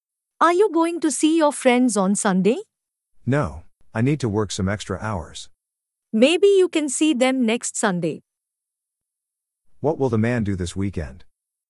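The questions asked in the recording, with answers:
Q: What will the man do this weekend?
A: Work some extra hours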